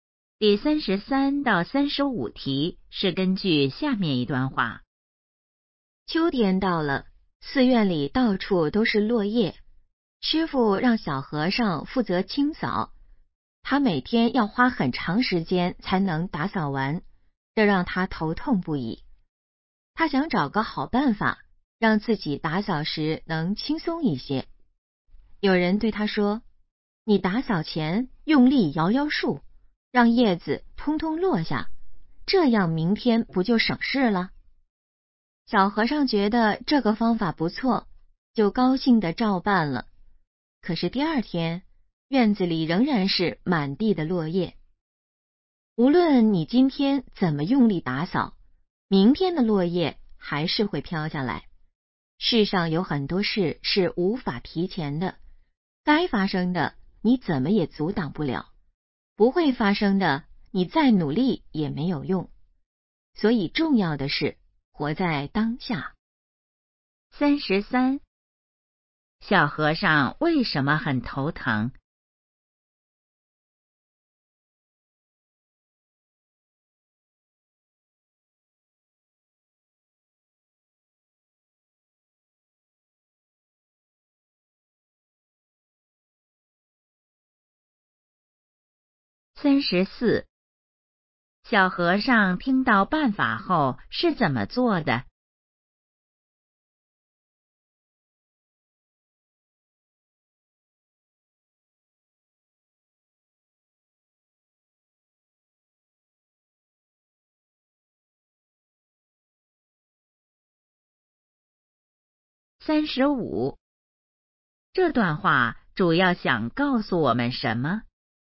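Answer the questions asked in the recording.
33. 每天扫落叶要花很长时间
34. 用力摇树让叶子落下
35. 要活在当下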